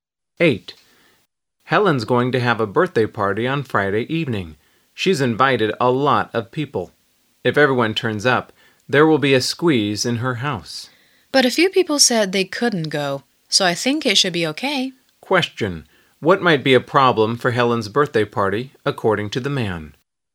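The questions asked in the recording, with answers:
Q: What might be a problem for Helen's birthday party, according to the man?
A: There may not be enough room in her house for everyone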